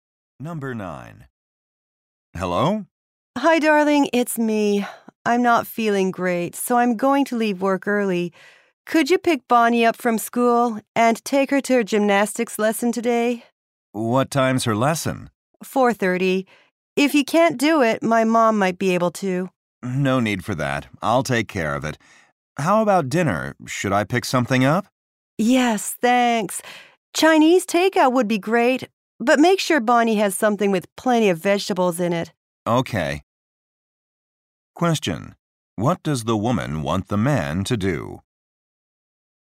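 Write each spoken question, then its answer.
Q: What does the woman want the man to do?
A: Pick Bonnie up from school, take her to gymnastics, and buy dinner.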